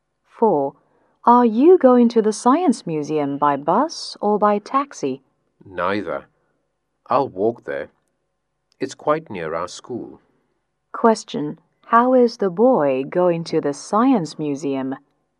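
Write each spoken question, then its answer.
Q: How is the boy going to the Science Museum?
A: On foot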